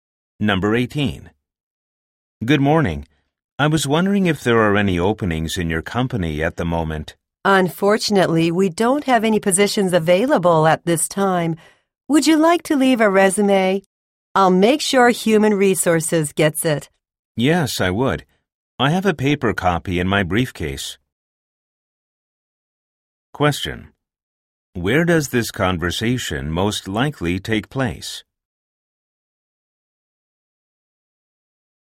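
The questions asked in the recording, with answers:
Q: Where does this conversation most likely take place?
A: At a company office (reception)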